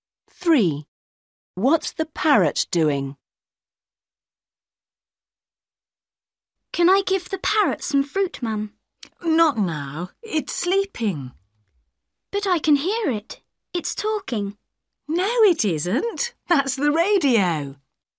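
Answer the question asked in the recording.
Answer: Sleeping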